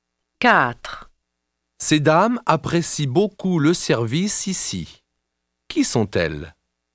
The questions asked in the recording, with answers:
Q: Qui sont-elles?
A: Ce sont des clientes.